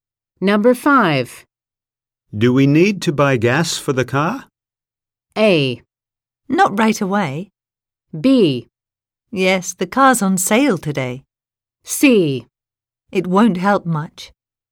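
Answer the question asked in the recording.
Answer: A: Not right away.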